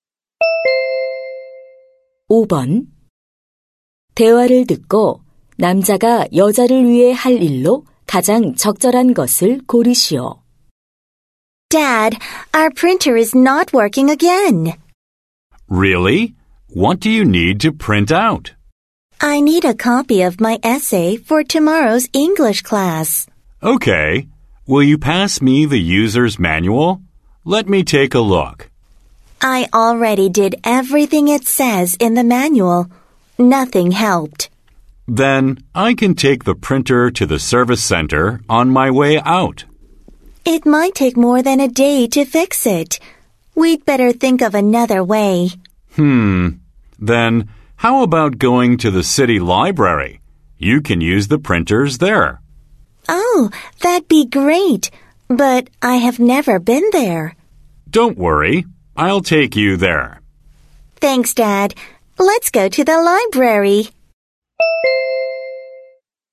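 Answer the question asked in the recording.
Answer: 시립 도서관에 데려다주기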